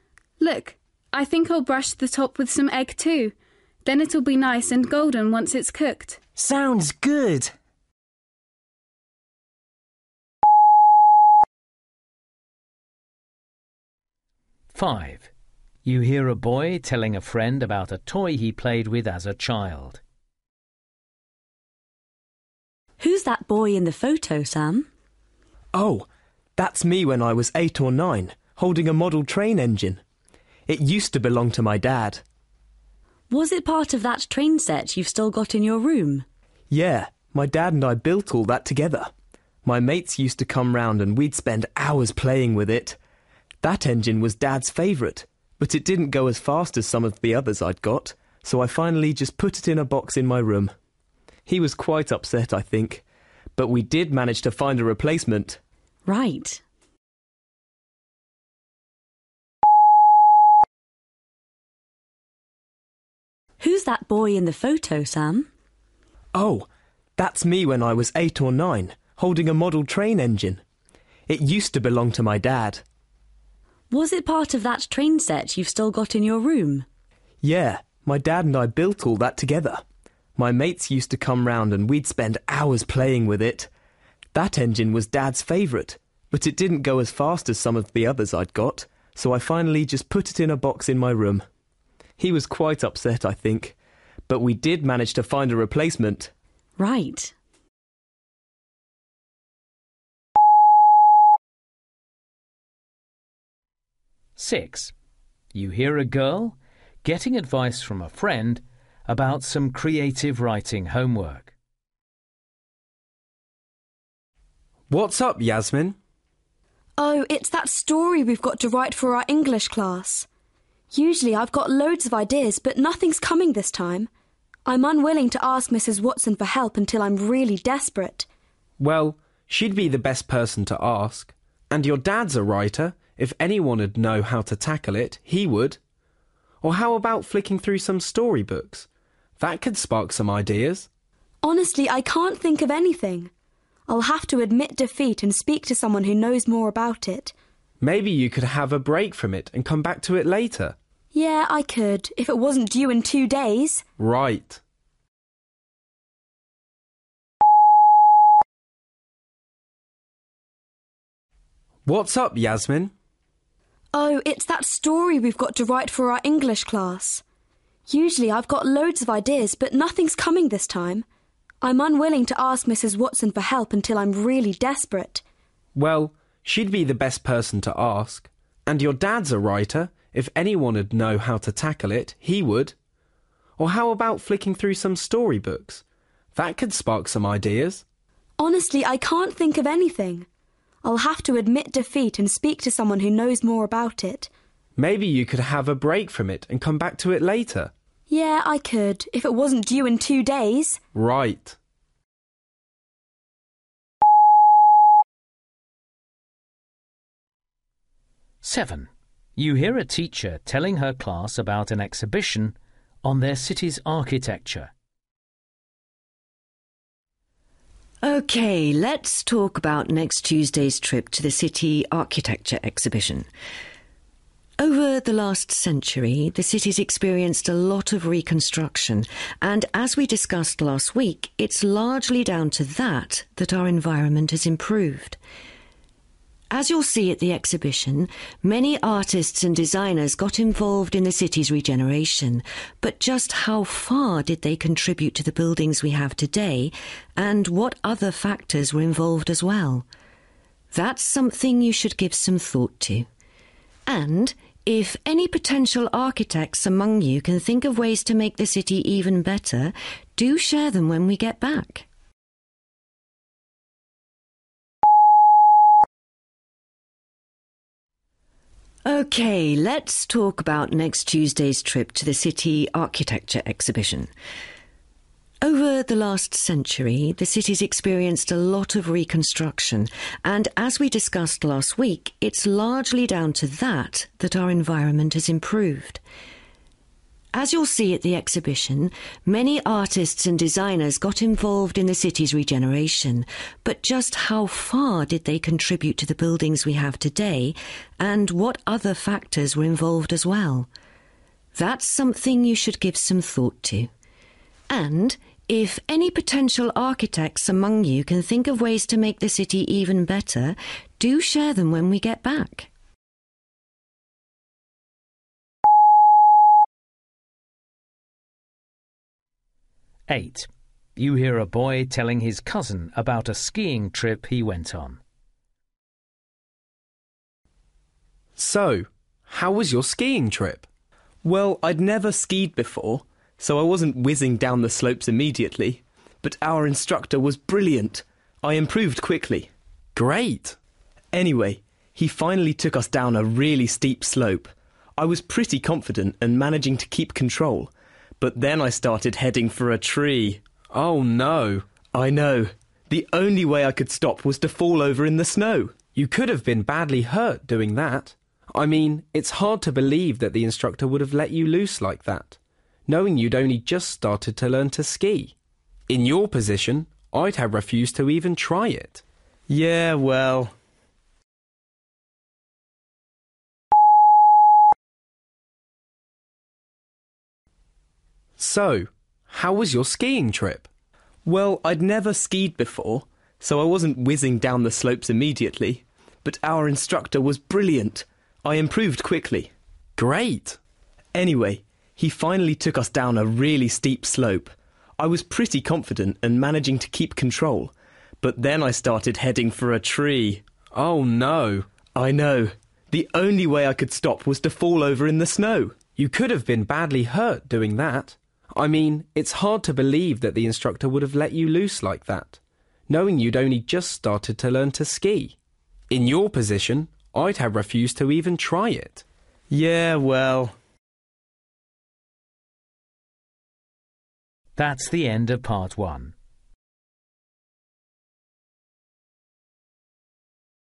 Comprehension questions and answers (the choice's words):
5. You hear a boy telling a friend about a toy he played with as a child. What does he say about it?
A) He always felt dissatisfied with it.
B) He made more friends because of it.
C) His dad felt sad once he stopped playing with it.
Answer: His dad felt sad once he stopped playing with it.

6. You hear a girl getting advice from a friend about some creative writing homework. Which advice does she decide to follow?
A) finding an alternative way of getting inspired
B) seeking help from a reliable source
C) taking some time out before continuing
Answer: seeking help from a reliable source

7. You hear a teacher telling her class about an exhibition on their city's architecture. What does she want them to do there?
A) consider what has influenced changes in the city's architecture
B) decide to what extent the city has been improved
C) come up with ideas for further changes to benefit other cities.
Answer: consider what has influenced changes in the city's architecture

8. You hear a boy telling his cousin about a skiing trip he went on. After hearing his story, his cousin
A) admits that he would have felt the same as him.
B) agrees that he took the right course of action.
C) suggests that it isn't entirely true.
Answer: suggests that it isn't entirely true.

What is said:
Jackie: Yeah, I've already made some shapes to put on. Look. I think I'll brush the top with some egg, too – then it'll be nice and golden once it's cooked!
Andrew: Sounds good!
Saskia: Who's that boy in the photo, Sam?
Sam: Oh, that's me when I was eight or nine – holding a model train engine. It used to belong to my dad.
Saskia: Was it part of that train set you've still got in your room?
Sam: Yeah, my dad and I built all that together – my mates used to come round and we'd spend hours playing with it. That engine was Dad's favourite, but it didn't go as fast as some of the others I'd got, so I finally just put it in a box in my room. He was quite upset, I think, but we did manage to find a replacement.
Saskia: Right.
Nadim: What's up, Yasmin?
Yasmin: Oh, it's that story we've got to write for our English class. Usually I've got loads of ideas, but nothing's coming this time. I'm unwilling to ask Mrs Watson for help until I'm really desperate ...
Nadim: Well, she'd be the best person to ask. And your dad's a writer – if anyone'd know how to tackle it, he would! Or how about flicking through some story books? That could spark some ideas.
Yasmin: Honestly, I can't think of anything. I'll have to admit defeat and speak to someone who knows more about it.
Nadim: Maybe you could have a break from it and come back to it later?
Yasmin: Yeah, I could – if it wasn't due in two days!
Nadim: Right.
OK, let's talk about next Tuesday's trip to the city architecture exhibition. Over the last century, the city's experienced a lot of reconstruction, and as we discussed last week, it's largely down to that that our environment has improved. As you'll see at the exhibition, many artists and designers got involved in the city's regeneration, but just how far did they contribute to the buildings we have today and what other factors were involved as well? That's something you should give some thought to. And if any potential architects among you can think of ways to make the city even better, do share them when we get back!
Alexis: So, how was your skiing trip?
Dan: Well, I'd never skied before, so I wasn't whizzing down the slopes immediately. But our instructor was brilliant – I improved quickly.
Alexis: Great.
Dan: Anyway, he finally took us down a really steep slope. I was pretty confident and managing to keep control, but then I started heading for a tree ...
Alexis: Oh, no.
Dan: I know. The only way I could stop was to fall over in the snow.
Alexis: You could've been badly hurt, doing that. I mean, it's hard to believe that the instructor would've let you loose like that, knowing you'd only just started to learn to ski. In your position, I'd have refused to even try it.
Dan: Yeah, well ...